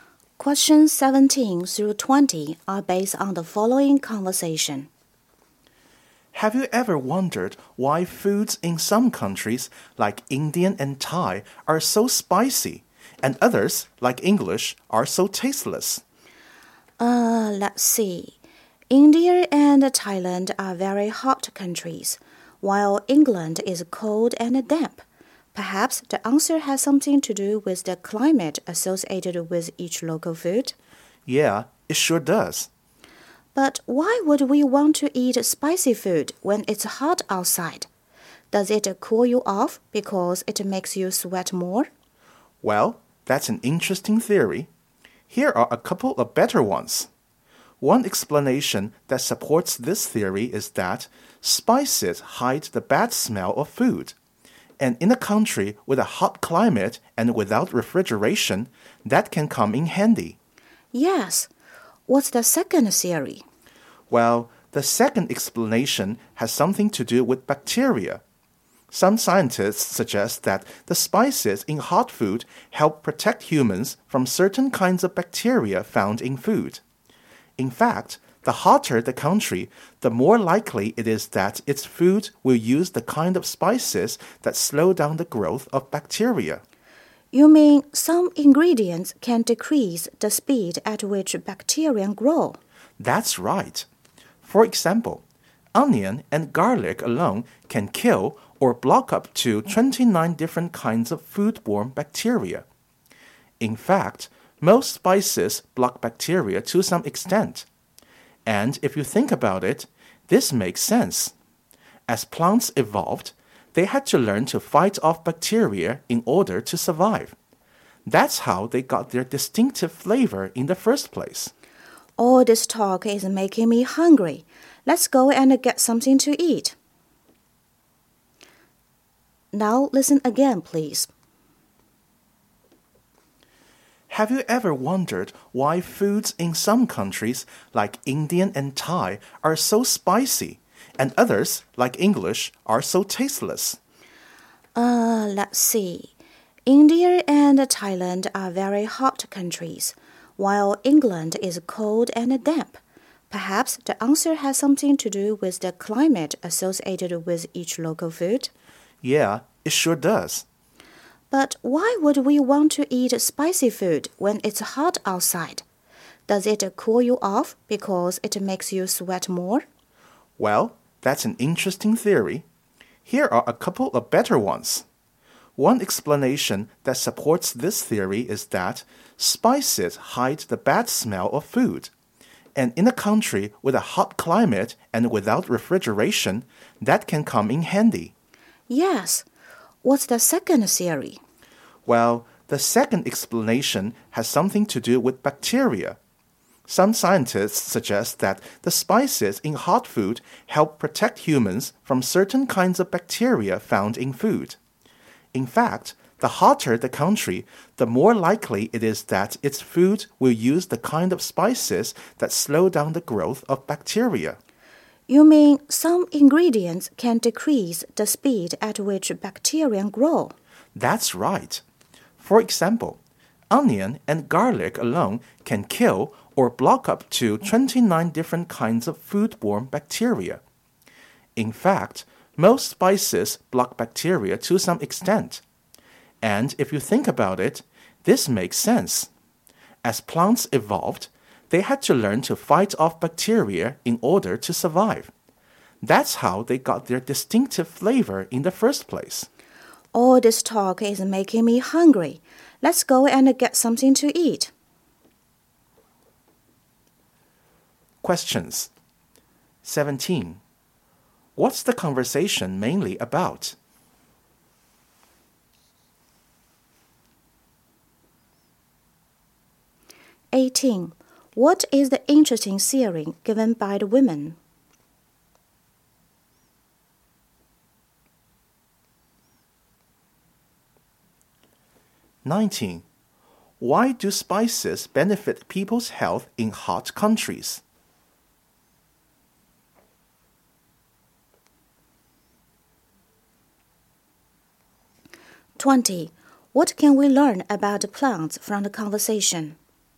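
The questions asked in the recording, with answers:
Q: What's the conversation mainly about?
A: Why foods in hot countries are spicy

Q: What is the interesting theory given by the women?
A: Spicy food cools you off by making you sweat

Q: Why do spices benefit people's health in hot countries?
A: They slow down or block the growth of bacteria

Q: What can we learn about plants from the conversation?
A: Their distinctive flavors came from evolving to fight bacteria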